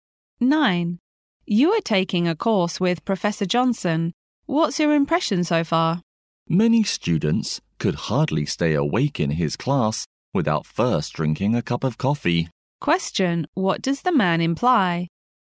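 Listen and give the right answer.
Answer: Professor Johnson's class is boring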